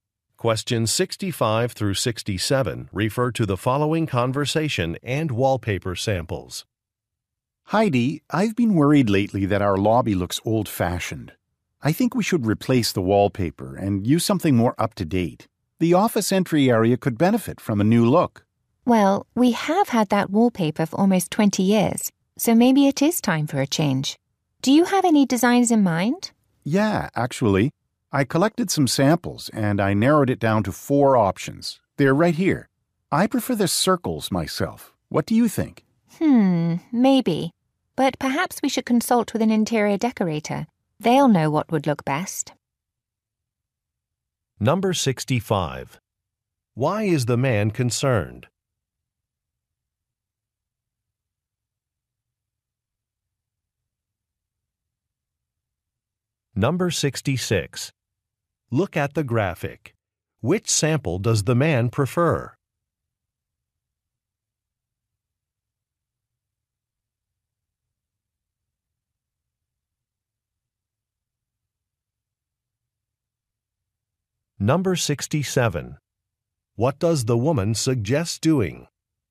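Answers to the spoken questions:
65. The lobby looks old-fashioned
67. Consulting an interior decorator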